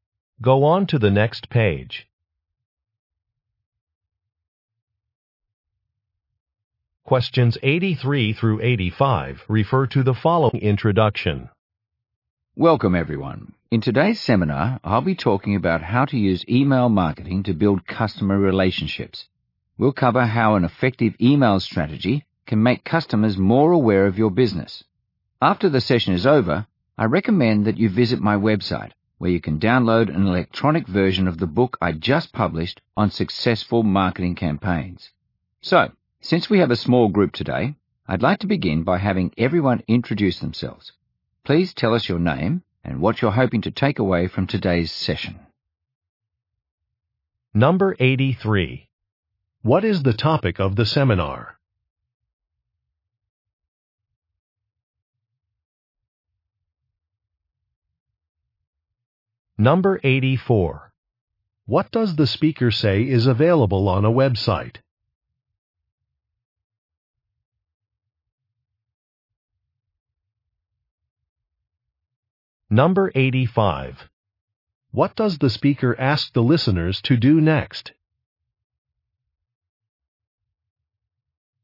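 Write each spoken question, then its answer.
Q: What is the topic of the seminar?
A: Email marketing

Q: What does the speaker say is available on a website?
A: An electronic version of her book

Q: What does the speaker ask the listeners to do next?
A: Introduce themselves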